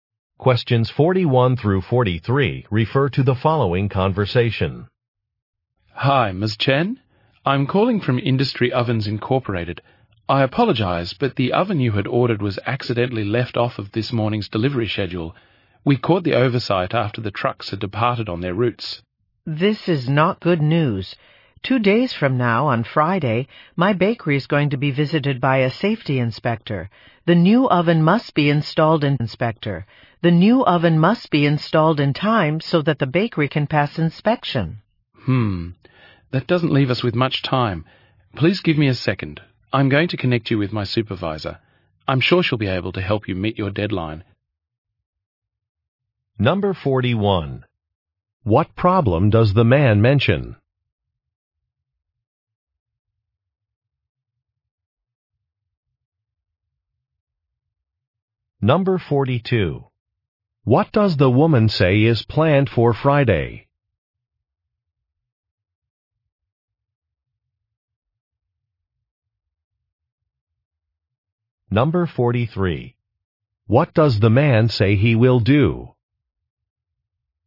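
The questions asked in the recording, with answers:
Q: What problem does the man mention?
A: The oven was left off the delivery schedule

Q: What does the woman say is planned for Friday?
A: A safety inspection

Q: What does the man say he will do?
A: Connect her with his supervisor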